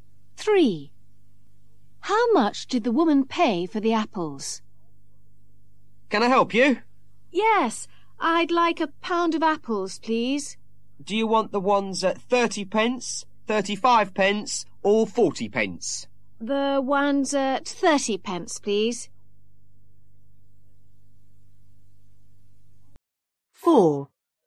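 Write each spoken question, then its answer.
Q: How much did the woman pay for the apples?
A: 30 pence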